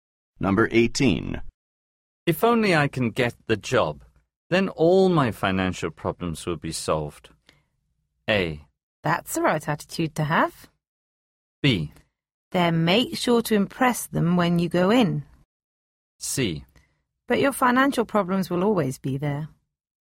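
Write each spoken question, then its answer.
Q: If only I can get the job, then all my financial problems will be solved.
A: B: Then make sure to impress them when you go in.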